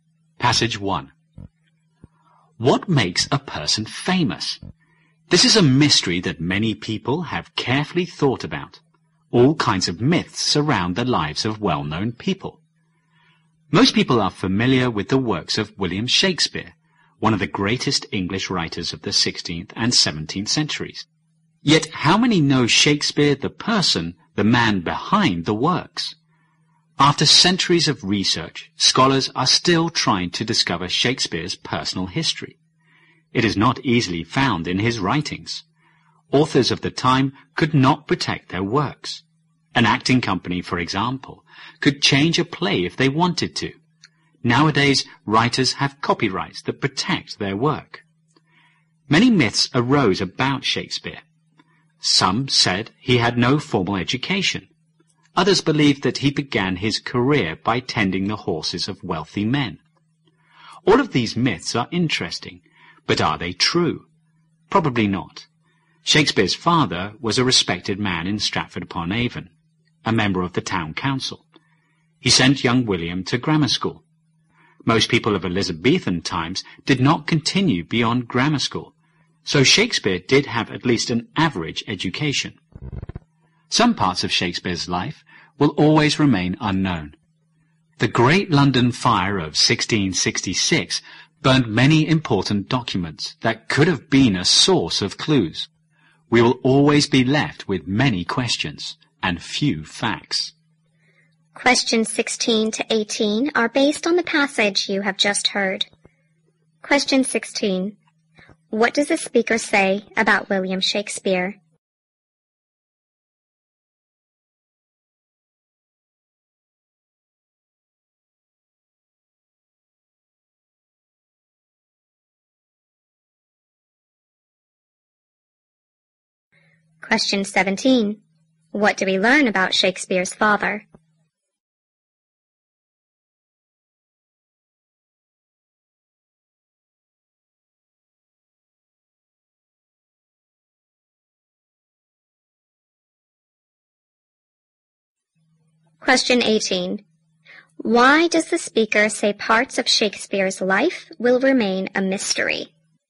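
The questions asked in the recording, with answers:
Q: What do we learn about Shakespeare's father?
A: He was a respected member of the town council.

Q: Why does the speaker say parts of Shakespeare's life will remain a mystery?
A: Many documents were burned in the Great London Fire of 1666.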